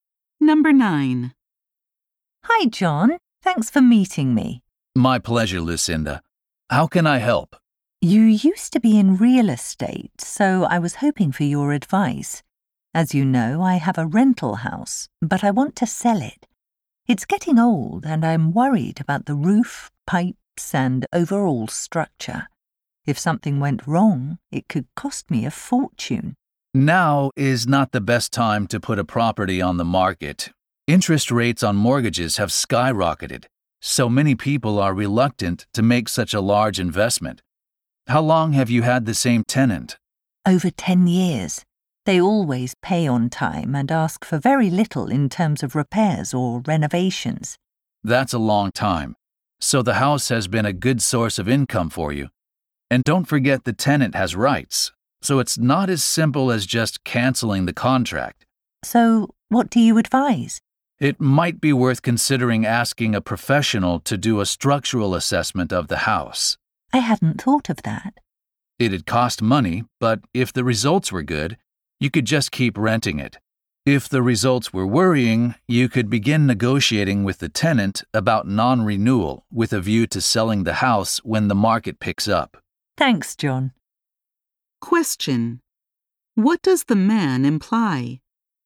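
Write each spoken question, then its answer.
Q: What does the man imply?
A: She should get a structural assessment of the house before deciding to sell it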